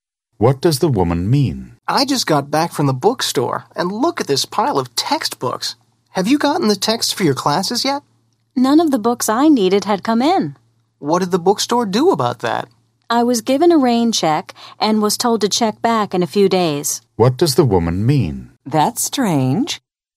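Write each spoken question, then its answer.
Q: What does the woman mean?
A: The bookstore gave her a rain check, so she can get the books later.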